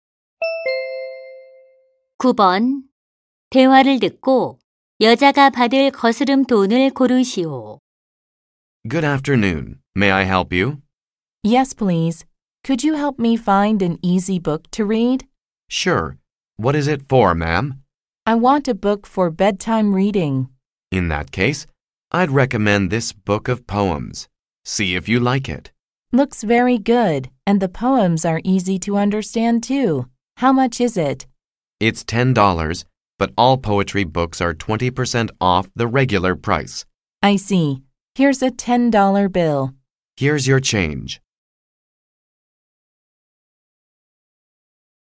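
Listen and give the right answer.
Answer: 2달러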